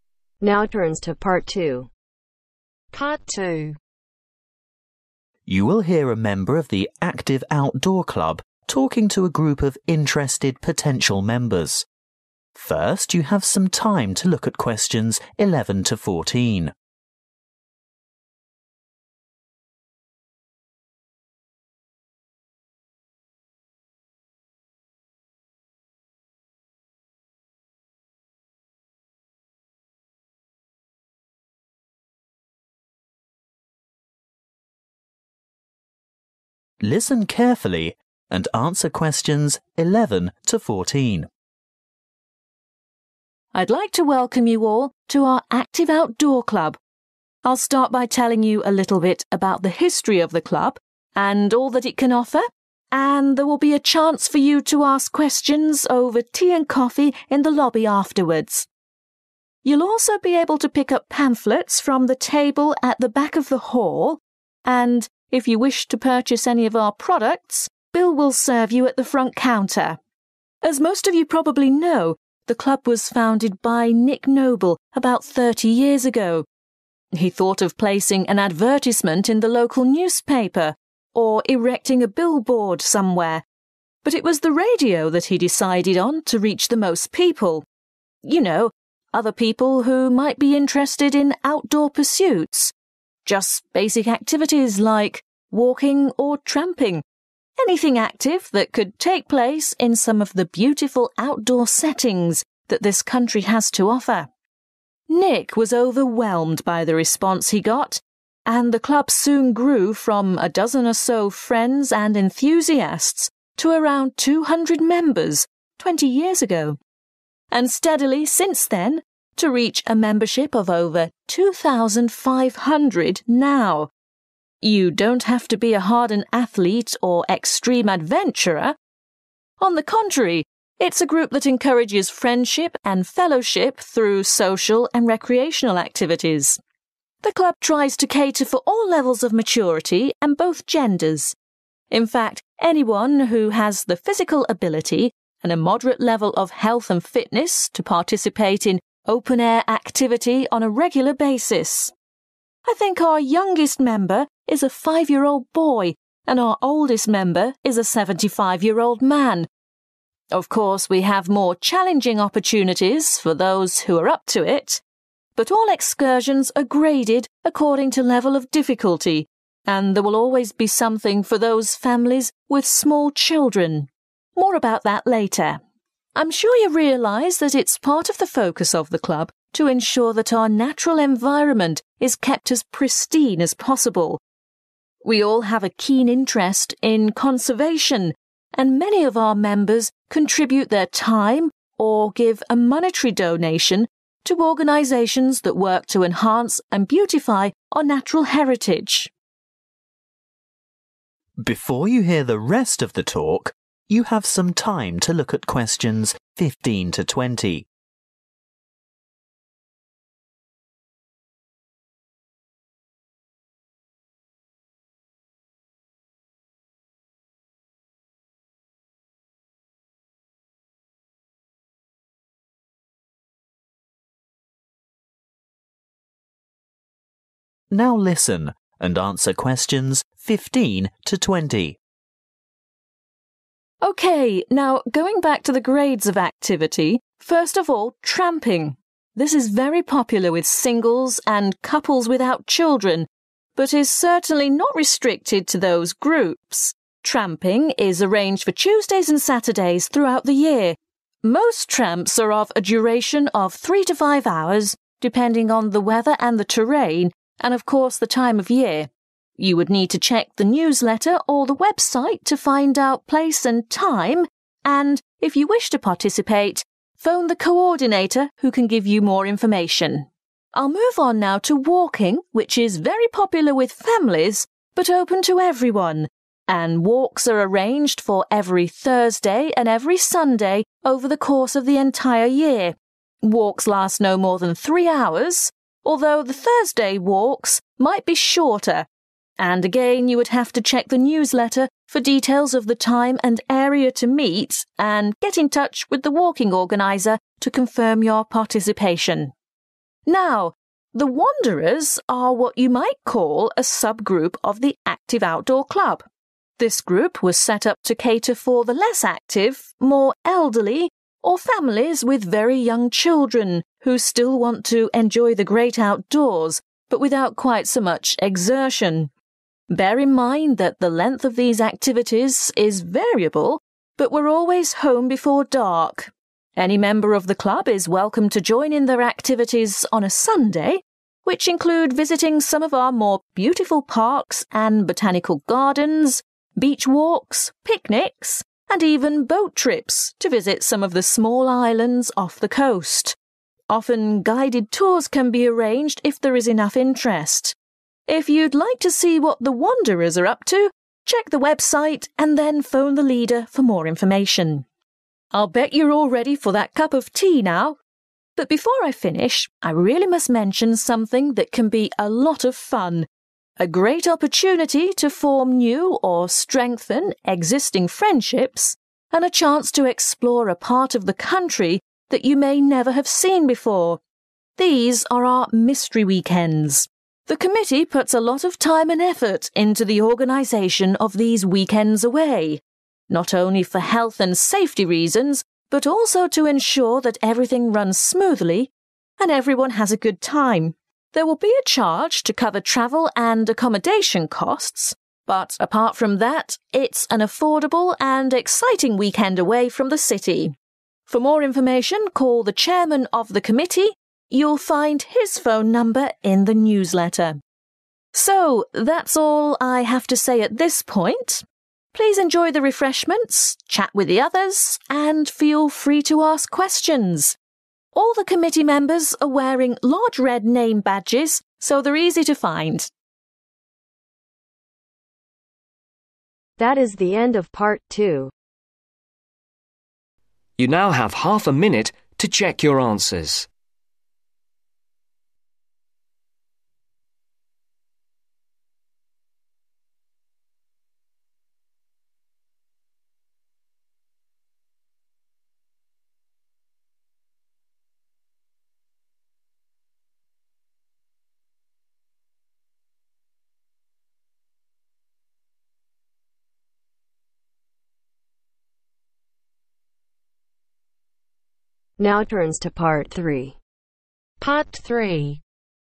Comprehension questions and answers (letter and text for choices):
Choose the correct letter, A , B or C.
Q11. Refreshments will be served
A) at the front counter.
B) in the lobby.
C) at the back of the hall.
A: B) in the lobby.

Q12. Nick Noble advertised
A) on the radio.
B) on a billboard.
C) in the newspaper.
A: A) on the radio.

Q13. The original number of founding members was about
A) 12.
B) 20.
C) 200.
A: A) 12.

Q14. The club provides activities primarily for reasonably fit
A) males up to 75.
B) females with young children.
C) males and females of any age.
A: C) males and females of any age.

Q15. (15)............ | Tuesday & Saturday | about 3-5 hours | coordinator |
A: Tramping

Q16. (16)............ | Thursday & Sunday | up to 3 hours | (17)............ |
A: walking/Walks

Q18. Wanderers | Sunday | (18)............ | leader |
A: Variable

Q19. (19)............ weekends | Saturday & Sunday | all weekend | (20)............ |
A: Mystery

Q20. (19)............ weekends | Saturday & Sunday | all weekend | (20)............ |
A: Chairman